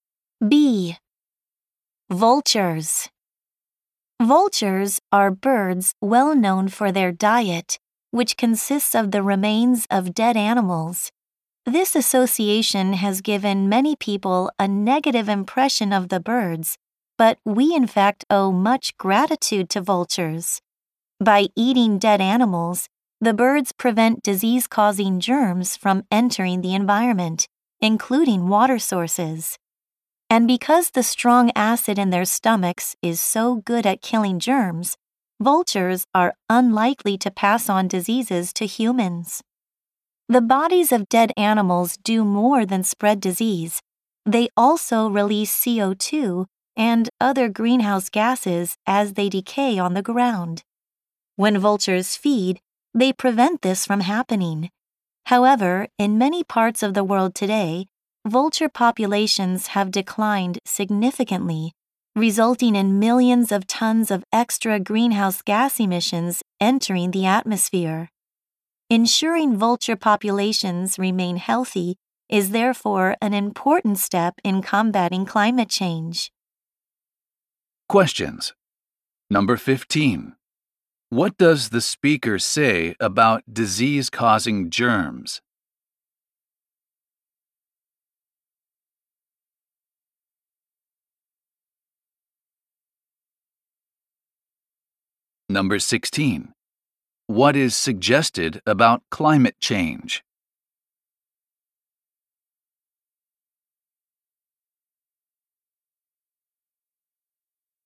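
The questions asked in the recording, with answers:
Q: What does the speaker say about disease-causing germs?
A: Vultures prevent them from entering the environment, and their stomach acid kills germs

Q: What is suggested about climate change?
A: Keeping vulture populations healthy helps fight it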